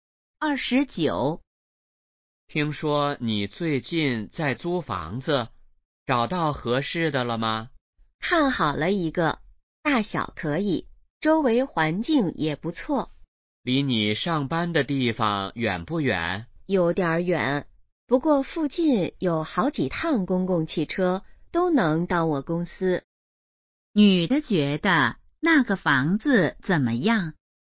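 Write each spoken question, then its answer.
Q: 女的觉得那个房子怎么样?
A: 还不错,但离公司有点远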